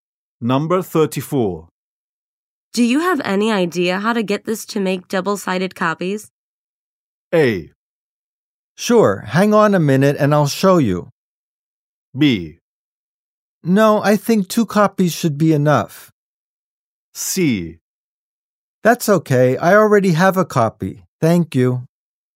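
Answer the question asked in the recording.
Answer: A: Sure, hang on a minute and I'll show you.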